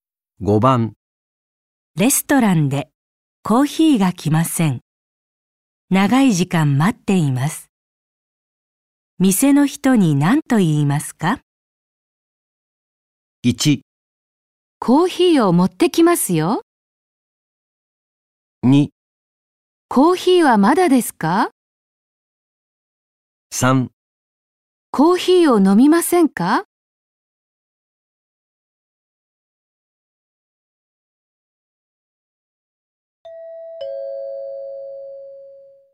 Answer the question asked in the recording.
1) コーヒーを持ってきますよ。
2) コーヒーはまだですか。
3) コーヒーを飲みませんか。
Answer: 2) コーヒーはまだですか。

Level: N5 Listening · Test 1